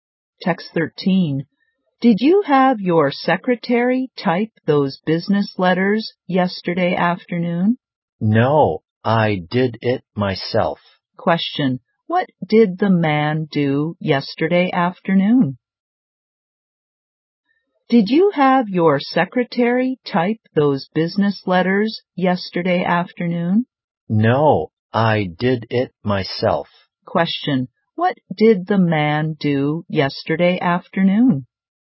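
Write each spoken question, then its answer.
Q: Question. What did the man do yesterday afternoon?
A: He typed the business letters himself.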